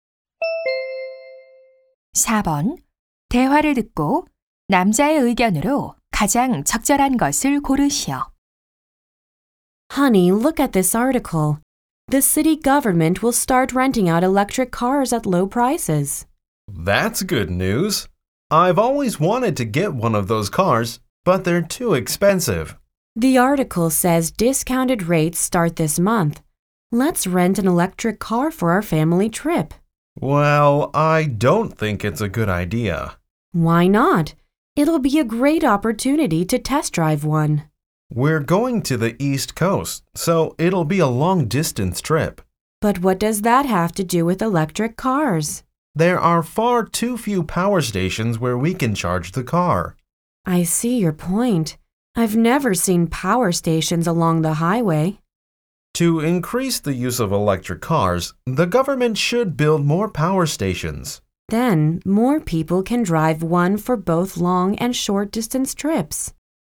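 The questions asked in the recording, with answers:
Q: 대화를 듣고 남자의 의견으로 가장 적절한 것을 고르시오.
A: 전기차 사용을 늘리려면 정부가 충전소를 더 지어야 한다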